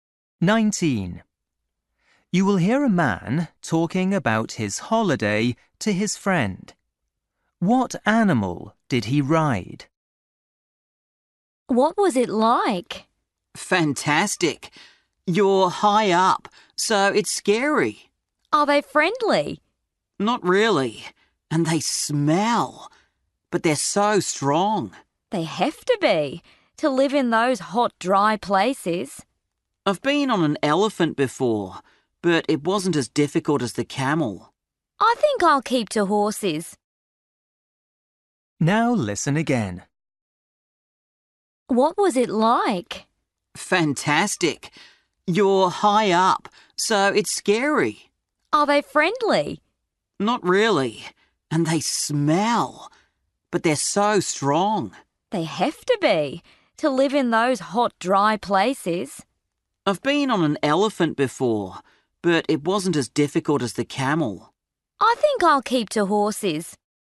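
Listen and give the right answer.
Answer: a camel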